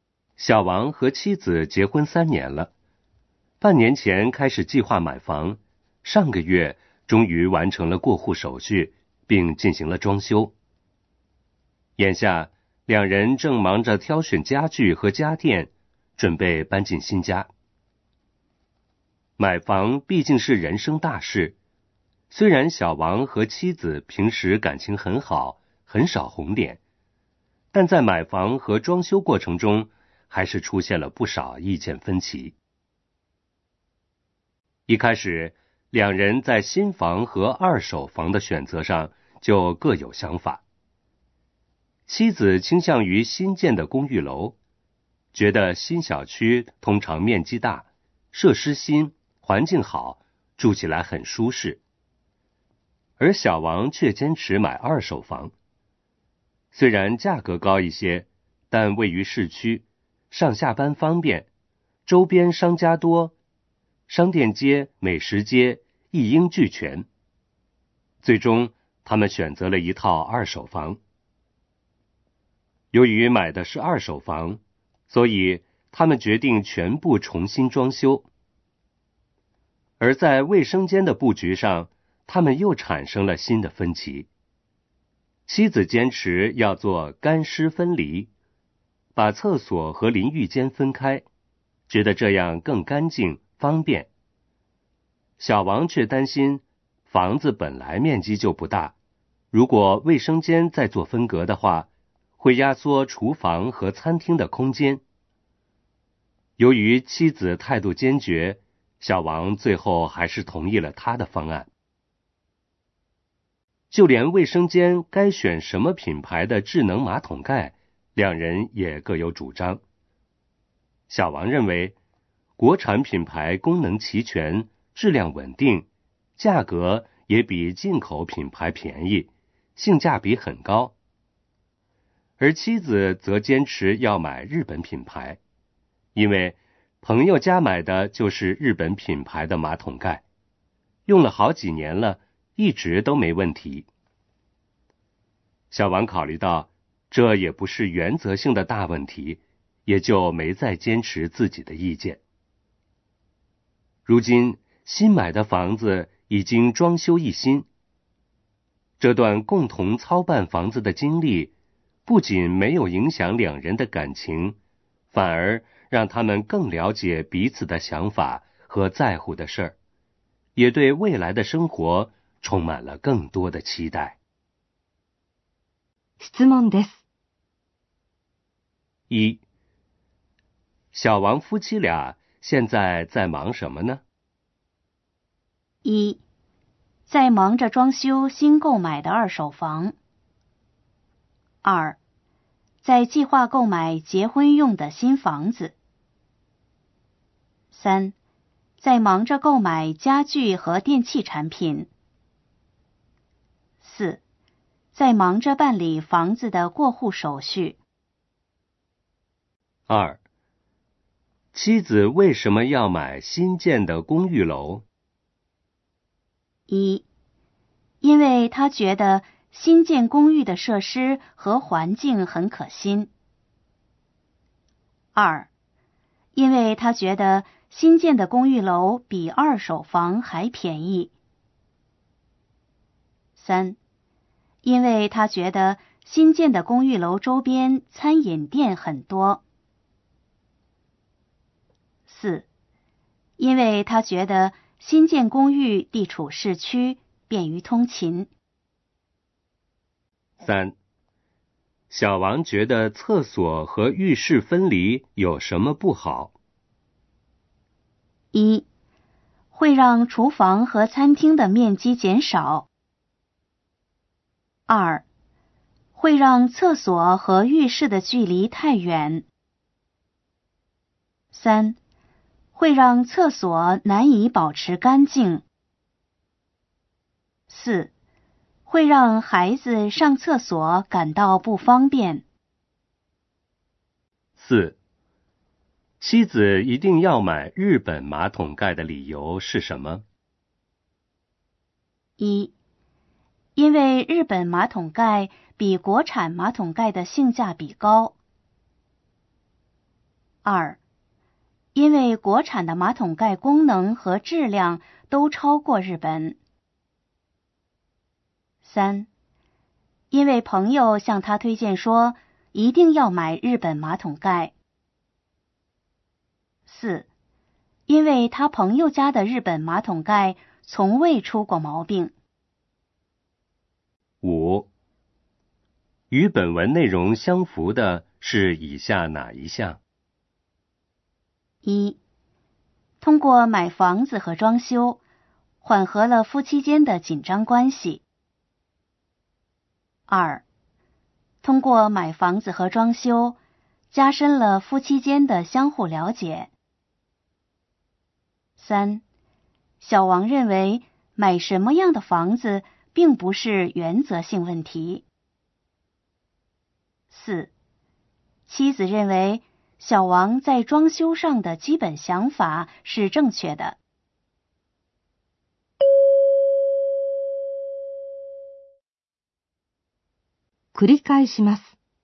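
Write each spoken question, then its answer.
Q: 小王夫妻俩现在在忙什么呢?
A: 3: 在忙着购买家具和电器产品

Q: 妻子为什么要买新建的公寓楼?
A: 1: 因为他觉得新建公寓的设施和环境很可心

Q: 小王觉得厕所和浴室分离有什么不好?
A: 1: 会让厨房和餐厅的面积减少

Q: 妻子一定要买日本马桶盖的理由是什么?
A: 4: 因为他朋友家的日本马桶盖从未出过毛病

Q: 与本文内容相符的是以下哪一项?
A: 2: 通过买房子和装修,加深了夫妻间的相互了解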